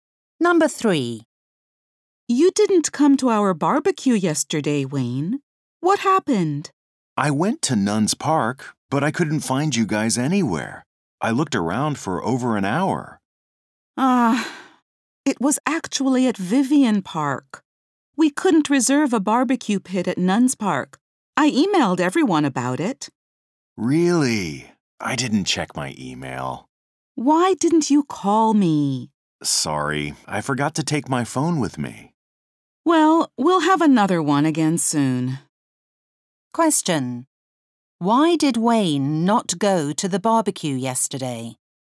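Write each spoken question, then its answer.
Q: Why did Wayne not go to the barbecue yesterday?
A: He went to the wrong park because he didn't check his email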